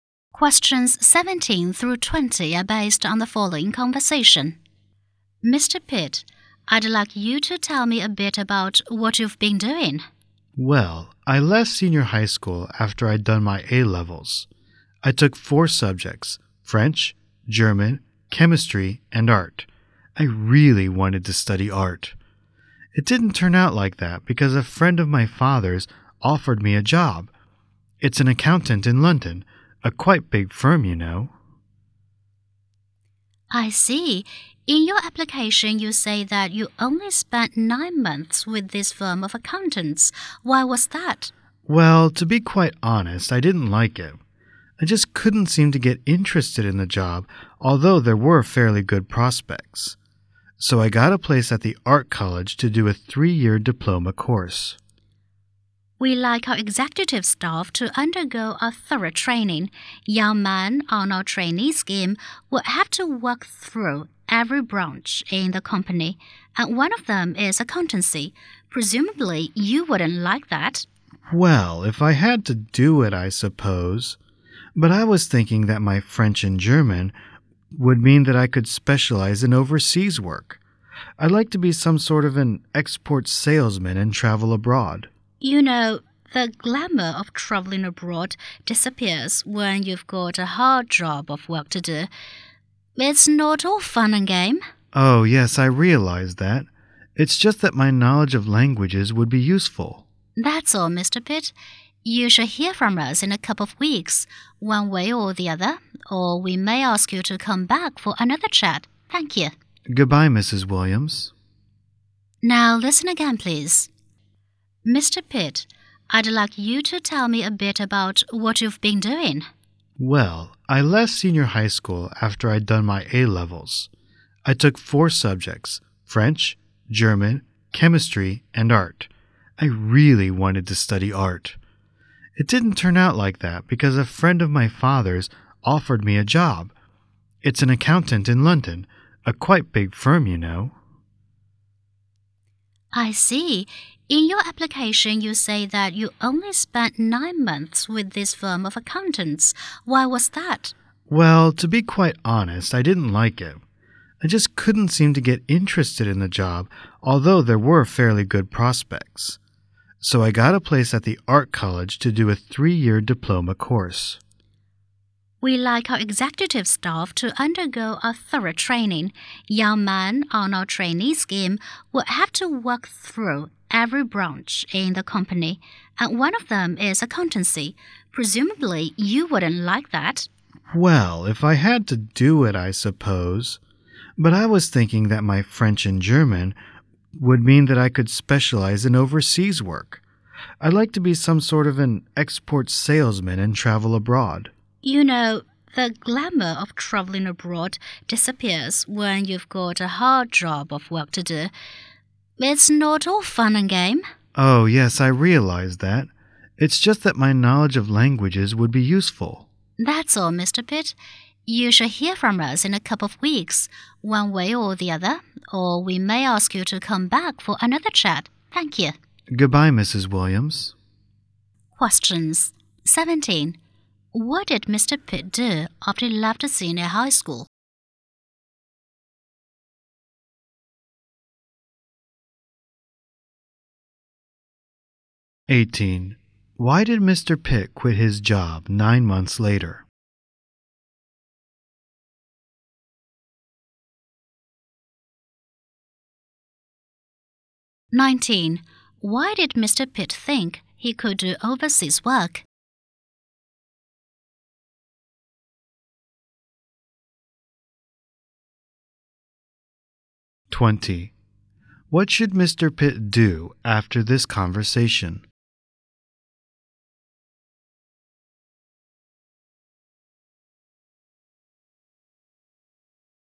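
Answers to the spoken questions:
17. He worked for an accounting firm in London
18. He wasn't interested in the job
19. He knows French and German
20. Wait to hear from the company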